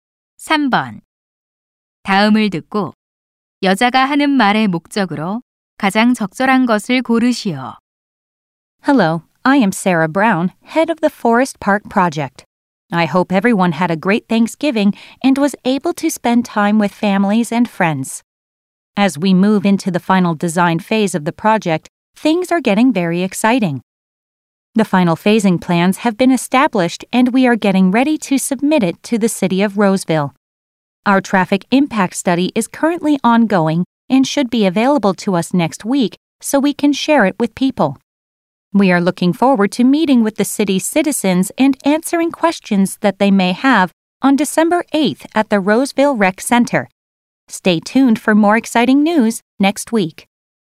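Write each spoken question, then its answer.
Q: 다음을 듣고 여자가 하는 말의 목적으로 가장 적절한 것을 고르시오.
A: 포레스트 파크 프로젝트의 진행 상황을 알리려고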